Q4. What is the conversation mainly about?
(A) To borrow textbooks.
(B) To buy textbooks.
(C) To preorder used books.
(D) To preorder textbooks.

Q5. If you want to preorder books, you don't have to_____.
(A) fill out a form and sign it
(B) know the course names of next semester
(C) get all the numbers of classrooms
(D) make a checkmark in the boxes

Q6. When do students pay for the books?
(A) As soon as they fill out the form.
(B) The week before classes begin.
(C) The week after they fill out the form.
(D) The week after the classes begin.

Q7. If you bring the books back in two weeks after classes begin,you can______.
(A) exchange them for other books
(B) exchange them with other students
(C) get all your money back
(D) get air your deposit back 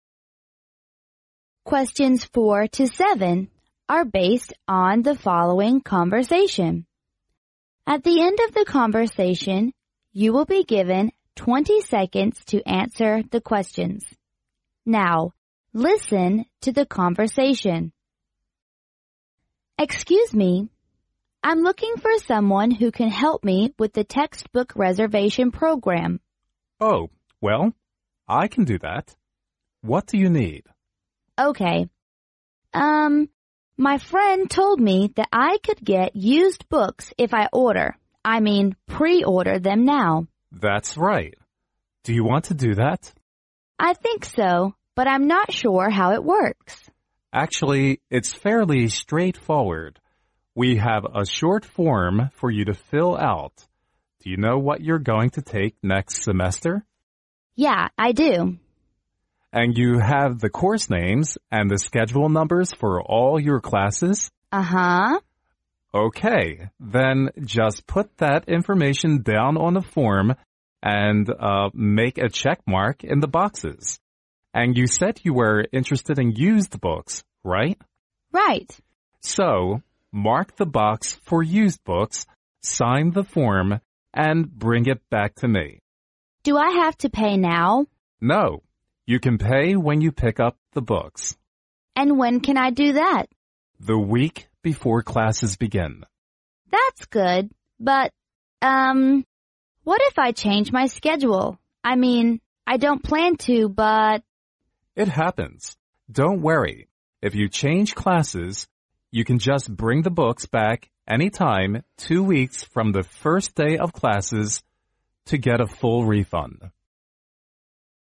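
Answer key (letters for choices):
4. C
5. C
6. B
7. C

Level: 英语四级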